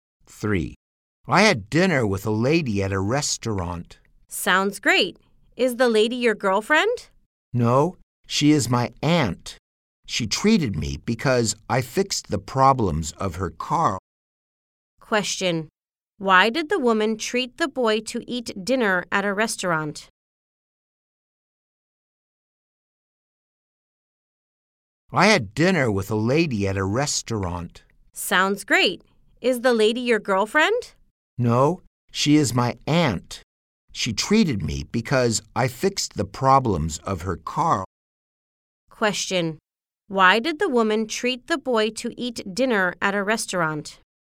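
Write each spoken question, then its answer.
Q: Why did the woman treat the boy to eat dinner at a restaurant?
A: Because he fixed the problems of her car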